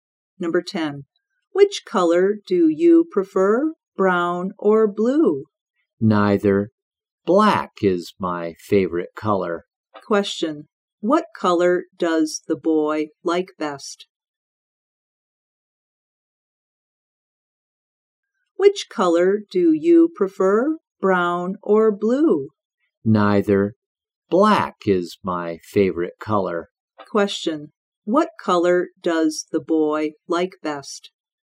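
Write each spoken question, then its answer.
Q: What color does the boy like best?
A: Black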